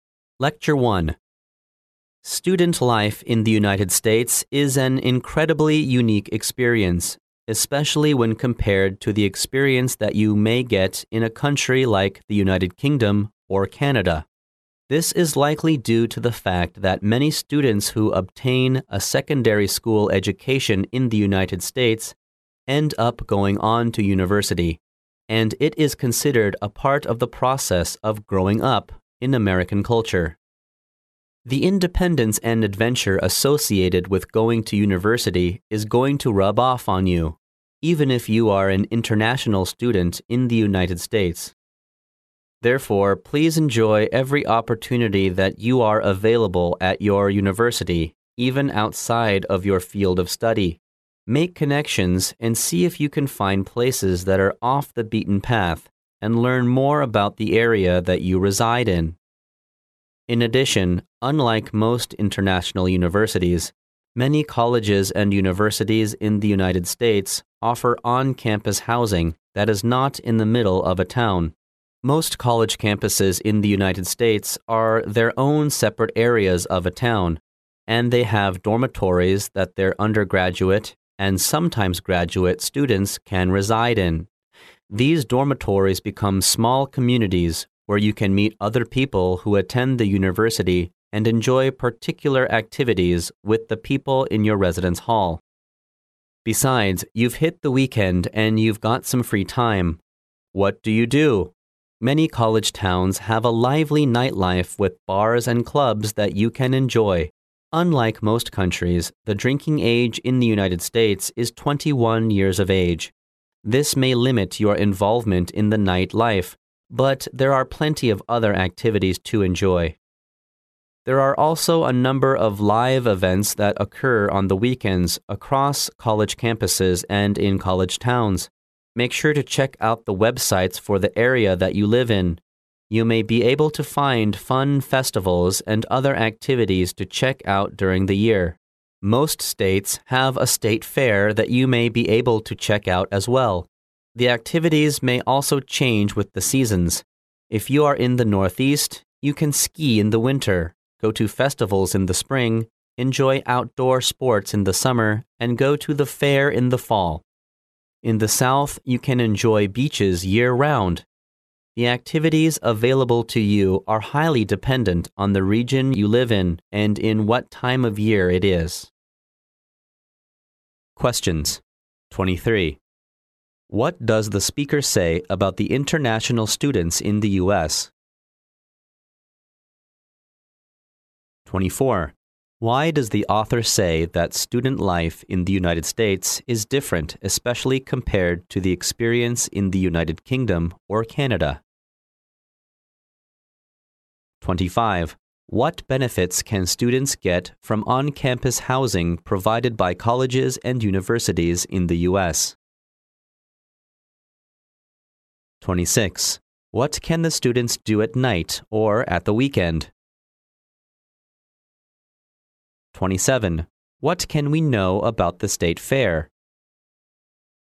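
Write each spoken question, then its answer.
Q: Why does the author say that student life in the United States is different, especially compared to the experience in the United Kingdom or Canada?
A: Many US secondary school graduates go on to university; it is part of growing up in American culture

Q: What benefits can students get from on-campus housing provided by colleges and universities in the U.S.?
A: They can meet other students and enjoy activities together in small communities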